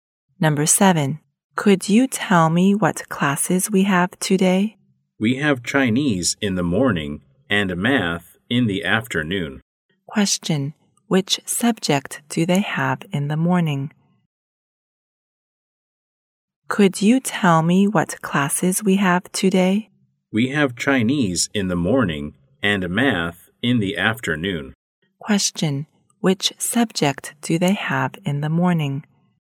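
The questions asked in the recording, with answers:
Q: Question. Which subject do they have in the morning?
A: Chinese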